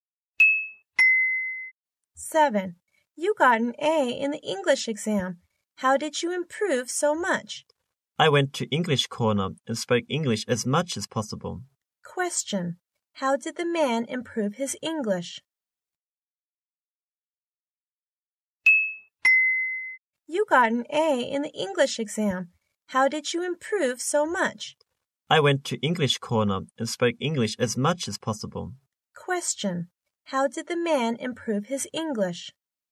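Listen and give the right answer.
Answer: He went to English Corner and spoke English as much as possible.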